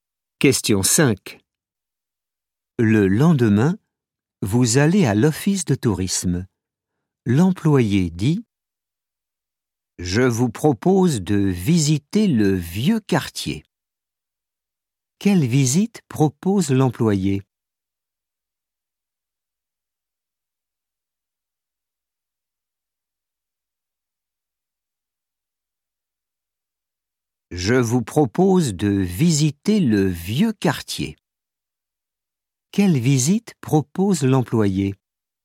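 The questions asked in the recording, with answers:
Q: Quelle visite propose l'employé?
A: Le vieux quartier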